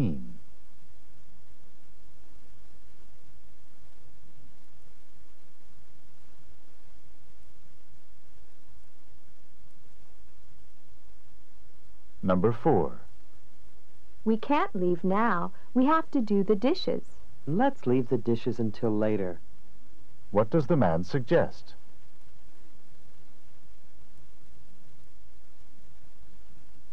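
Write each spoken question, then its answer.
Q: What does the man suggest?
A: Doing the dishes later.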